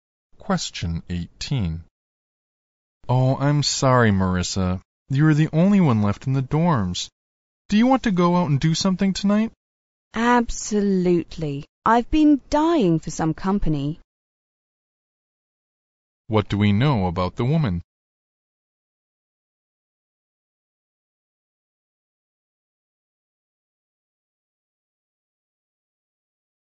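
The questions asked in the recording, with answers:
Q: What do we know about the woman?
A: She is lonely and glad to go out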